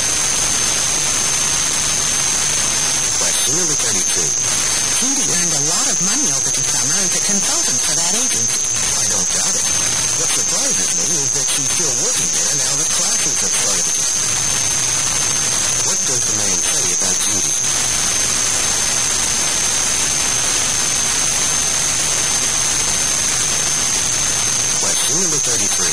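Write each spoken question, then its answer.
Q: What does the man say about Judy?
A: He is surprised she is still working there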